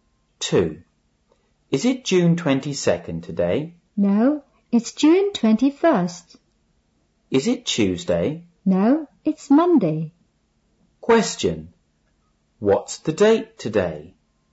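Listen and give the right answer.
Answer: June 21st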